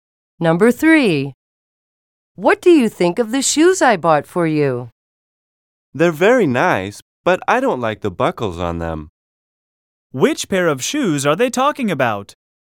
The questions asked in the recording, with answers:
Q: Which pair of shoes are they talking about?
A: The shoes in picture E have buckles.